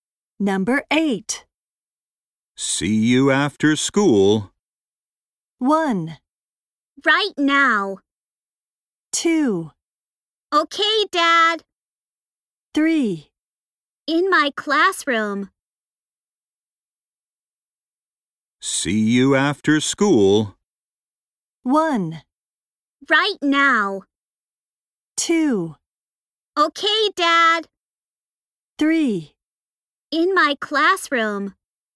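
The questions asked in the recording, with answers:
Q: See you after school.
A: 2: Okay, Dad.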